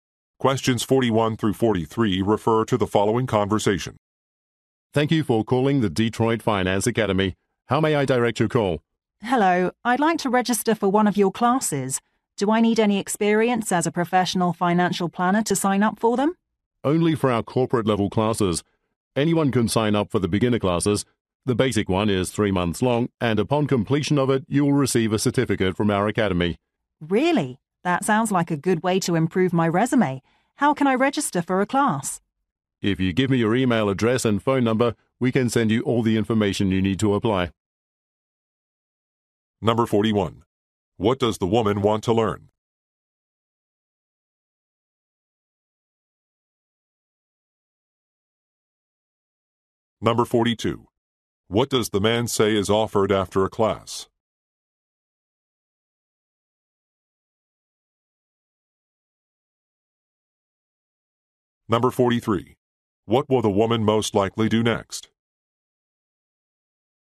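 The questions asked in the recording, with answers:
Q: What does the woman want to learn?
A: Financial planning

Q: What does the man say is offered after a class?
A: A certificate from the academy

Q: What will the woman most likely do next?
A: Give her email address and phone number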